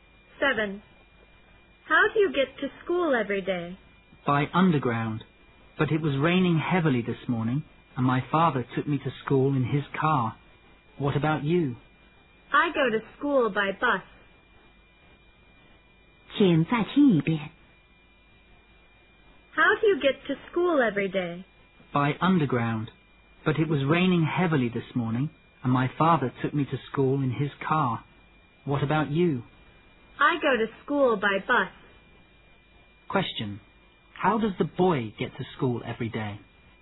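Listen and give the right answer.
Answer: By underground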